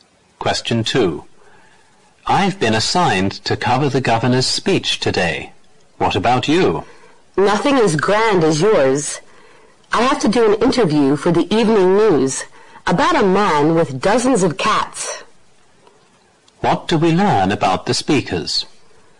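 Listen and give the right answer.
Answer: They are both news reporters.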